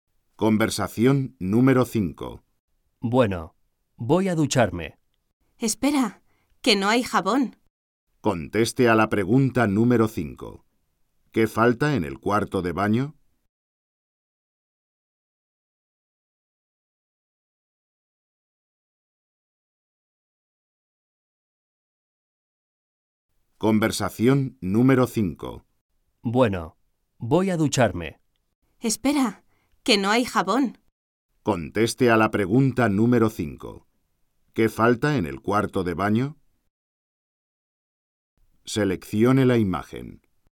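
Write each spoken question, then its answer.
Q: ¿Qué falta en el cuarto de baño?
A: Jabón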